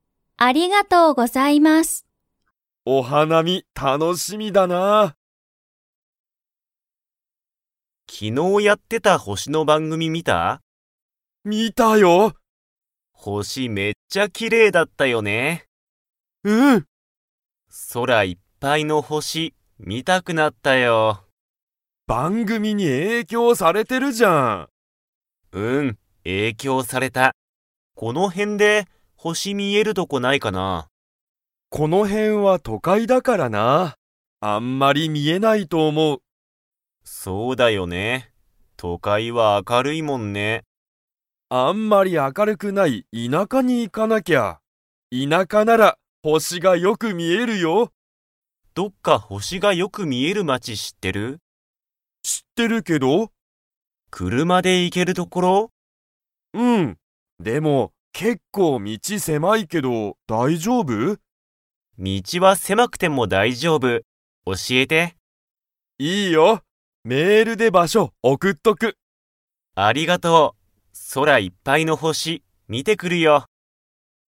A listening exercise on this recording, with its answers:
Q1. たいちは何なにが見みたいですか?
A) 番組ばんぐみ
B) 星ほし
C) 都会とかい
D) 田舎いなか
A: 星ほし

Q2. ともやは、星ほしが見みえる町まちを 。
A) 知しってる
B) 知しらない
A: 知しってる

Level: Level 4

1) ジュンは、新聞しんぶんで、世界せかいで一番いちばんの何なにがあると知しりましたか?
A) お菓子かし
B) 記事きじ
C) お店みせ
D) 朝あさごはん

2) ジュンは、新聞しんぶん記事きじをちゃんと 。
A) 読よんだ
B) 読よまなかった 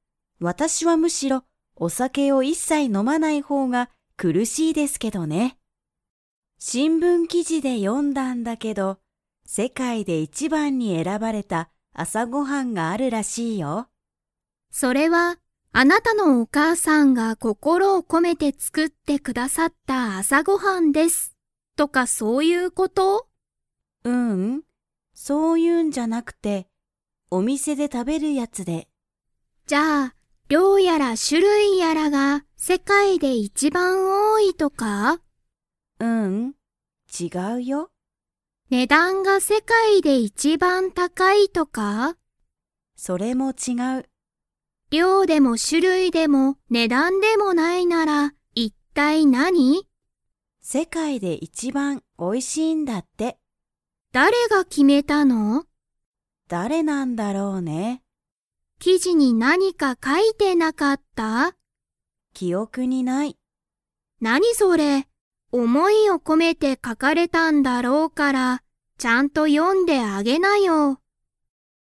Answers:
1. 朝あさごはん
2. 読よまなかった

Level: Level 4

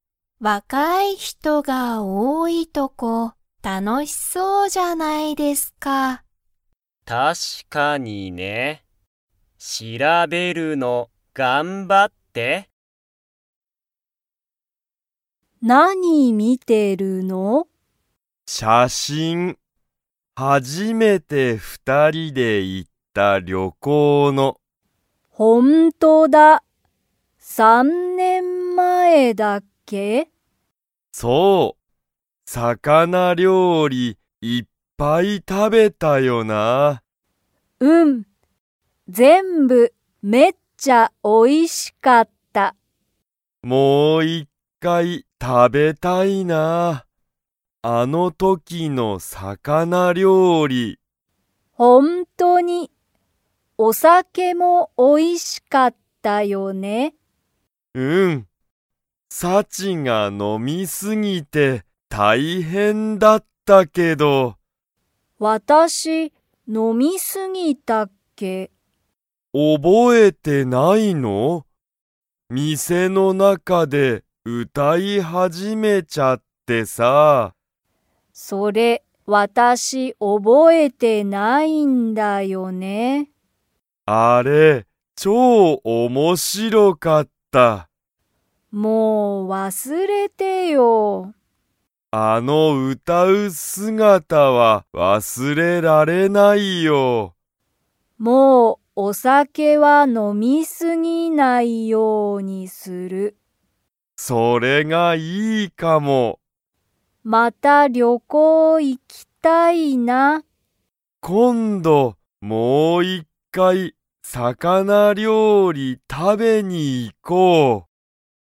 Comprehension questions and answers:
Comprehension Quiz (Skip if you don't understand the conversation yet)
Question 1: ユウトは、何なにを見みていますか?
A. 魚料理さかなりょうり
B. テレビ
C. 写真しゃしん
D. 映画えいが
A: 写真しゃしん

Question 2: サチは、店みせの中なかで 。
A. 歌うたった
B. 歌うたわなかった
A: 歌うたった

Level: Level 3

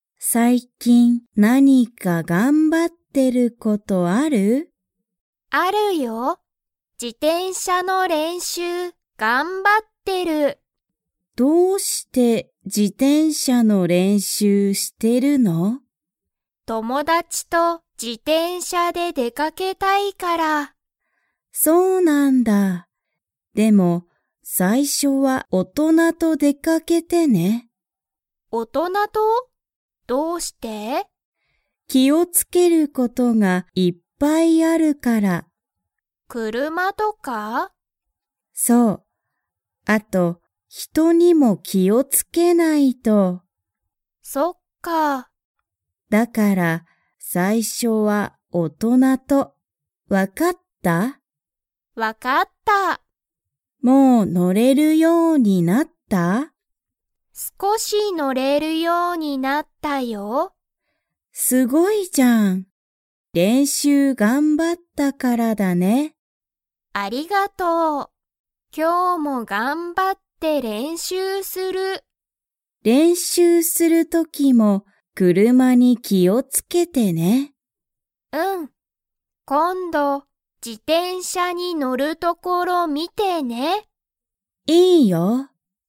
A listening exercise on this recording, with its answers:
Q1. あやは、友達ともだちと から自転車じてんしゃの練習れんしゅうを頑張がんばっている。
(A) 学校がっこうに行いきたい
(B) 練習れんしゅうしたい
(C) 仕事しごとしたい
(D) 出でかけたい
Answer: 出でかけたい

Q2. あやは今日きょう、自転車じてんしゃの練習れんしゅうをしますか?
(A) はい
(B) いいえ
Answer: はい

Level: Level 3

